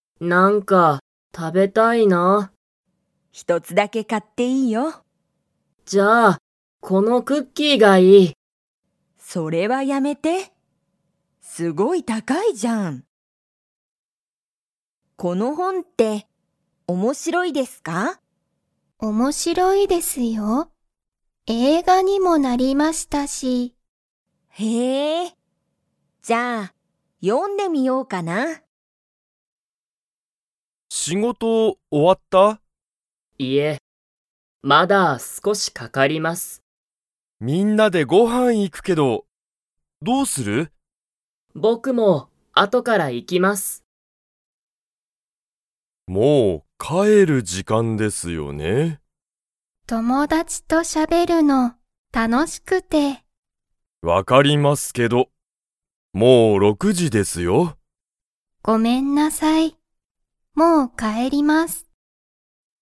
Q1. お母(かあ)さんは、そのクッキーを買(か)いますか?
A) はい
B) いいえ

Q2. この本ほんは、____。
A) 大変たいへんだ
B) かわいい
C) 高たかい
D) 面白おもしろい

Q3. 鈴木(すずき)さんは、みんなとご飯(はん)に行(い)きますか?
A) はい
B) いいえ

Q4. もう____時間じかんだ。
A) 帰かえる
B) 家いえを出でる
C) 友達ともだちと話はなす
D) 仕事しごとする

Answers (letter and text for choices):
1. B) いいえ
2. D) 面白おもしろい
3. A) はい
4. A) 帰かえる

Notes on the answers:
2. Kaori: Is this book interesting?
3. 鈴木(すずき):僕(ぼく)も後(あと)から行(い)きます!
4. 先生(せんせい):もう帰(かえ)る時間(じかん)ですよね?